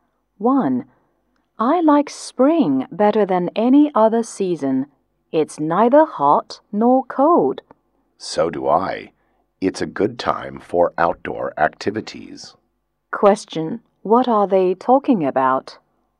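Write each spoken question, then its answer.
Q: What are they talking about?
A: Spring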